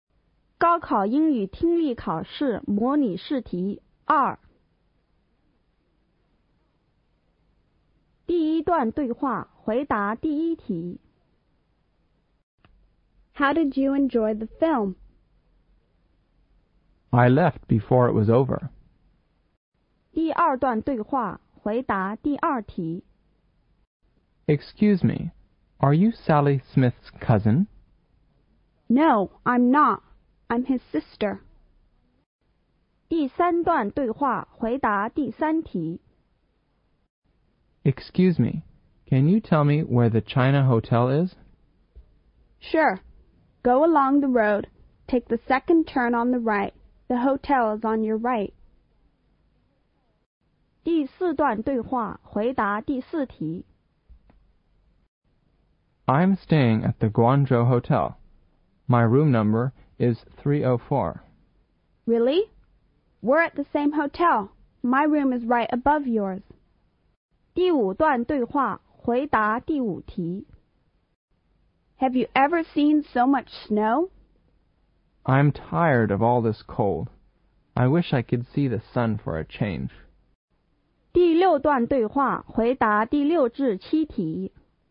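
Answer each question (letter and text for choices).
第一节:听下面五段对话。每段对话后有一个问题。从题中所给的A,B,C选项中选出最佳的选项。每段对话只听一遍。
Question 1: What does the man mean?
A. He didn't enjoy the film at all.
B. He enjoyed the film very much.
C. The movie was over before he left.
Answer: A. He didn't enjoy the film at all.

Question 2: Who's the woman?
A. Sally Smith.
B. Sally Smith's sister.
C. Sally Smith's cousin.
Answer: B. Sally Smith's sister.

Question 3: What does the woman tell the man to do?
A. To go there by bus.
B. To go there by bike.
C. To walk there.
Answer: C. To walk there.

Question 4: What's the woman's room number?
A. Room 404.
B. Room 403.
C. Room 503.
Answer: A. Room 404.

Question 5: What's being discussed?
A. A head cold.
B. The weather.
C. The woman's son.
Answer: B. The weather.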